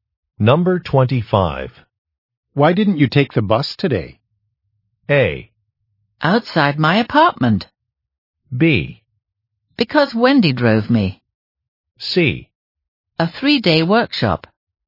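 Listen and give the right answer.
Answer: B: Because Wendy drove me.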